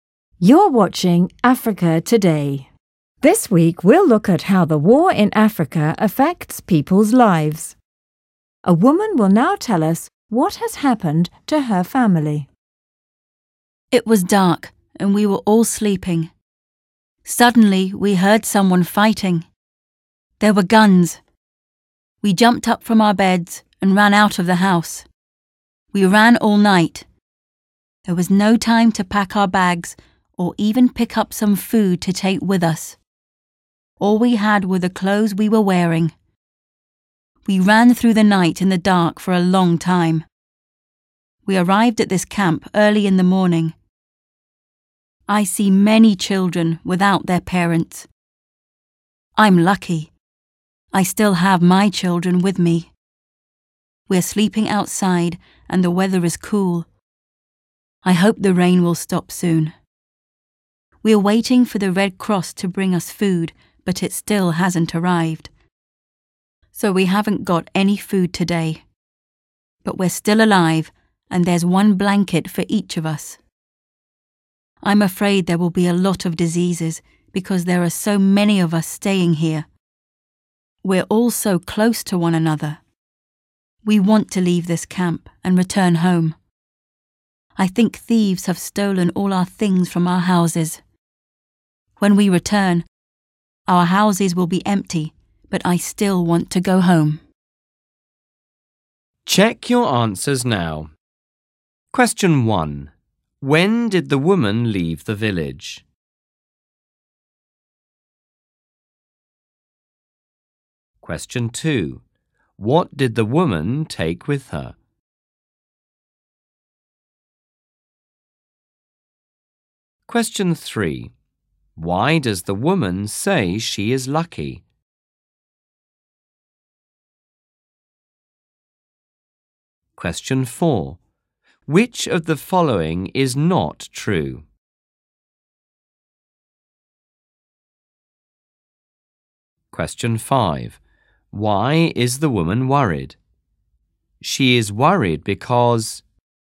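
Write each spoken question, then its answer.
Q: When did the woman leave the village?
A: At night, when it was dark and they were sleeping

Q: What did the woman take with her?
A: Nothing, only the clothes they were wearing

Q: Why does the woman say she is lucky?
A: She still has her children with her

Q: Why is the woman worried?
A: There may be many diseases because so many people are staying close together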